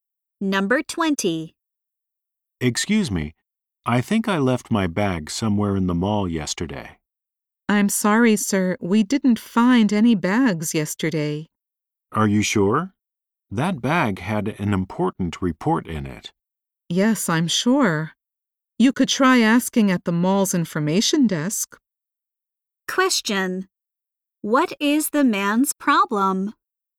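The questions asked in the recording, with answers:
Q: What is the man's problem?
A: He lost his bag with an important report.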